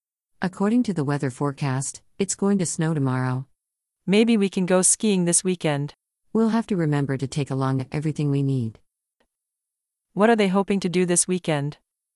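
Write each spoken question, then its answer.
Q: What are they hoping to do this weekend?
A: Go skiing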